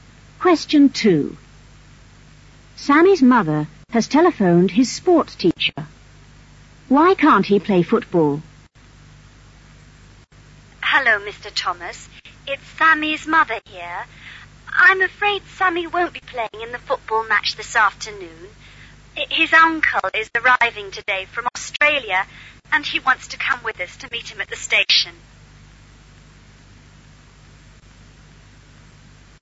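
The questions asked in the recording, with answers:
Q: Why can't he play football?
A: He is going to meet his uncle, who is arriving from Australia, at the station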